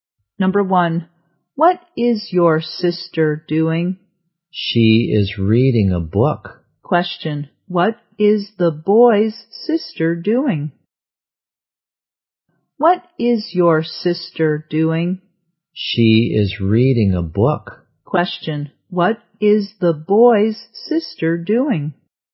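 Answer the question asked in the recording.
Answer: She is reading a book.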